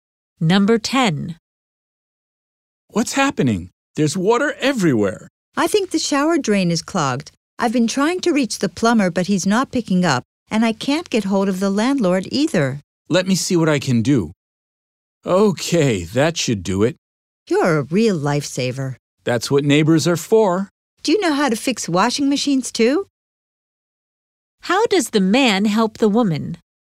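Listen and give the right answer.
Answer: He unclogs the shower drain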